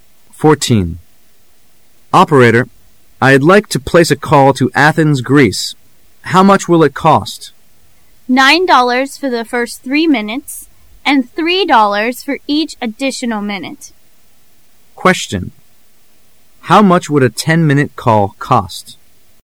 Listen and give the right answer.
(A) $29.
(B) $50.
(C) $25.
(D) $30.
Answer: (D) $30.

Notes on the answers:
M: Operator, I'd like to place a call to Athens, Greece. How much will it cost? W: $ 9 for the first three minutes and $ 3 for each additional minute. Q: How much would a ten--minute call cost? [试题分析]本题考查对数据的计算。 [关键词语]$9 for the first three minutes,$3 for each additional minute. [详细解答]从文中可算出10分钟的话费为:前3分钟花费9美元,后7分钟花费7×3=21美元,则共花费9+2l=30美元,故应选D。